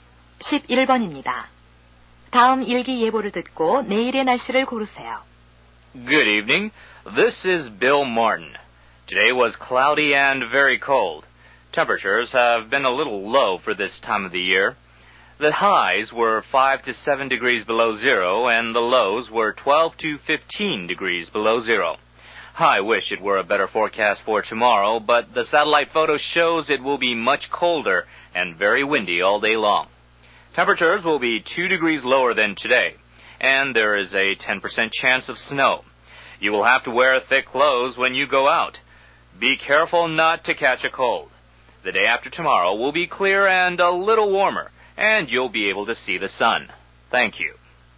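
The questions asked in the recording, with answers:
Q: 다음 일기 예보를 듣고 내일의 날씨를 고르세요.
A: 훨씬 춥고 하루 종일 바람이 많이 붐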